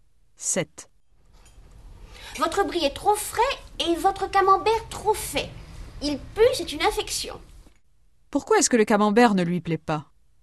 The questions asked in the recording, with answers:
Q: Pourquoi est-ce que le camembert ne lui plaît pas?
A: Parce qu'il est trop fait.